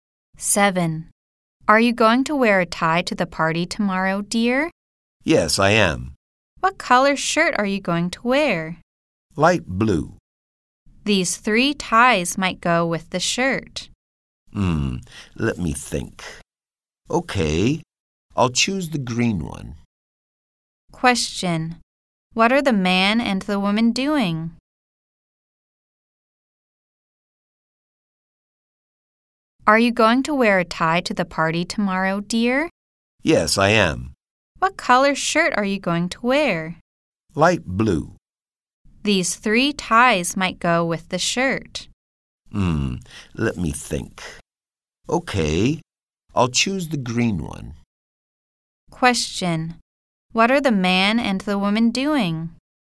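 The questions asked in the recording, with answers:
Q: Question. What are the man and the woman doing?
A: They are choosing a tie for the man to wear to the party.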